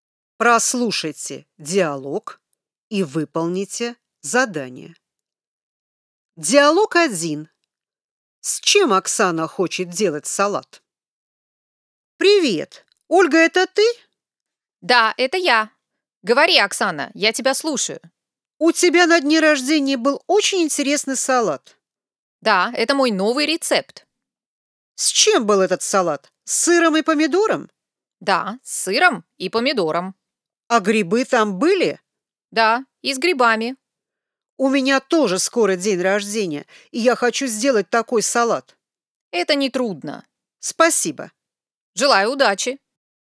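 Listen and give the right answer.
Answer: С сыром, помидором и грибами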